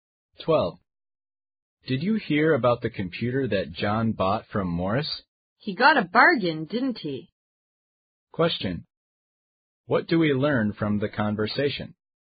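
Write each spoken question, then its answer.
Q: What do we learn from the conversation?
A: John got the computer from Morris at a bargain price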